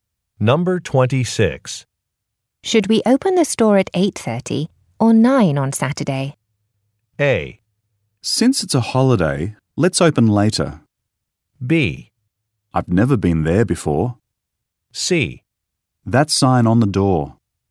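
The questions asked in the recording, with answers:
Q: Should we open the store at 8:30 or 9 on Saturday?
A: A: Since it's a holiday, let's open later.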